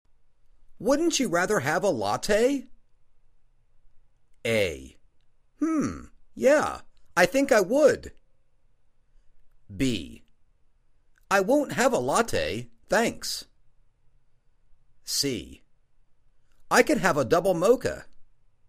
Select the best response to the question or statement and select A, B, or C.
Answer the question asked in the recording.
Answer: Hmm... yeah, I think I would.